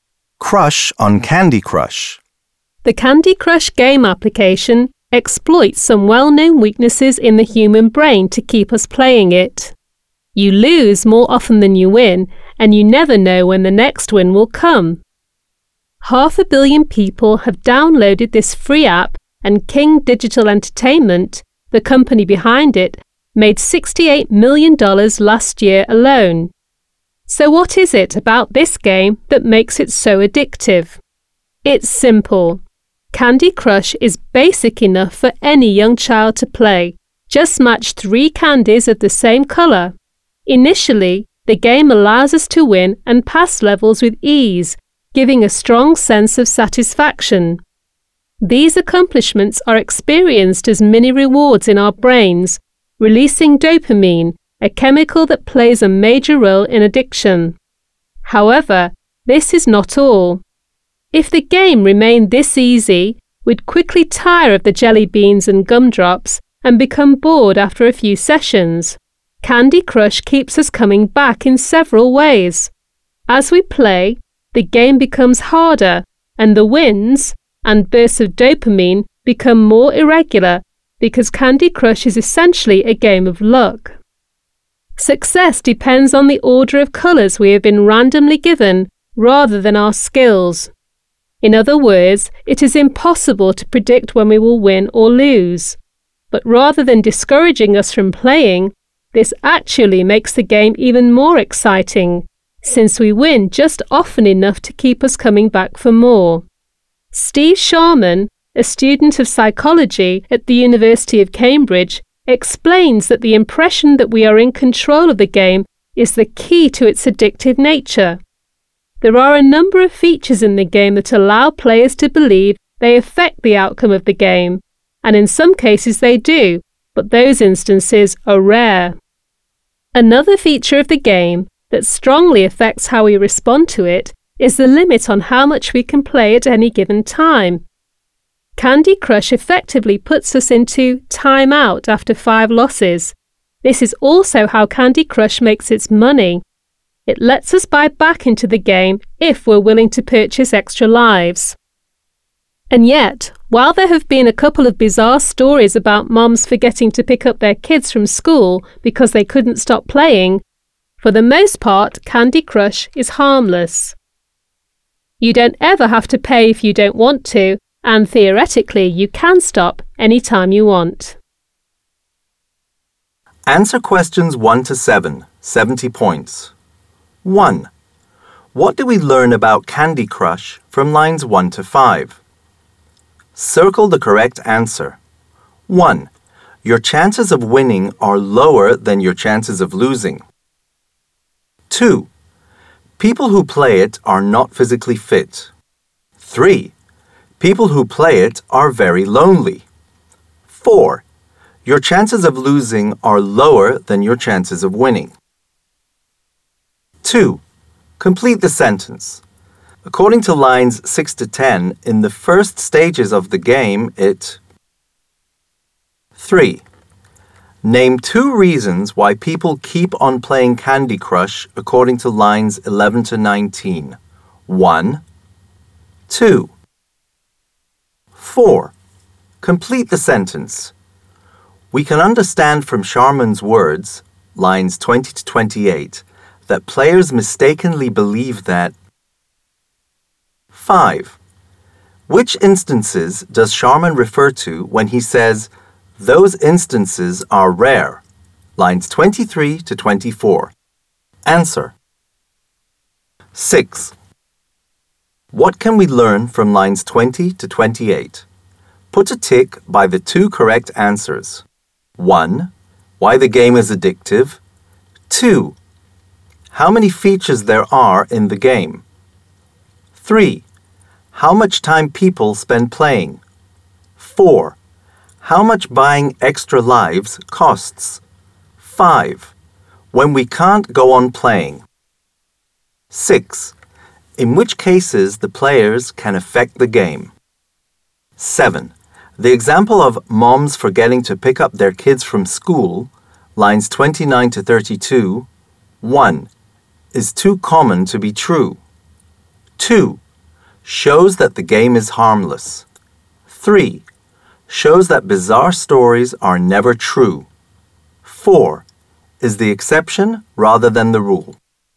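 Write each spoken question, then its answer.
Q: What do we learn about Candy Crush from lines 1 to 5?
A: 1: Your chances of winning are lower than your chances of losing.

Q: Complete the sentence. According to lines 6 to 10, in the first stages of the game, it...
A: allows us to win and pass levels with ease

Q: Complete the sentence. We can understand from Sharman's words, lines 20 to 28, that players mistakenly believe that...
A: they are in control of the game

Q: Which instances does Sharman refer to when he says, "Those instances are rare," lines 23 to 24?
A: cases where players really affect the outcome of the game

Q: The example of moms forgetting to pick up their kids from school, lines 29 to 32,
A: 4: Is the exception rather than the rule.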